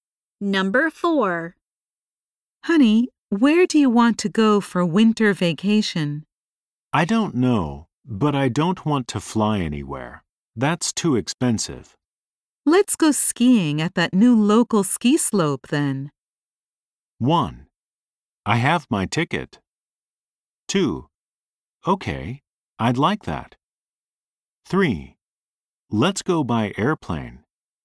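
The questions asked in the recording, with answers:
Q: Let's go skiing at that new local ski slope then.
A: 2: Okay, I'd like that.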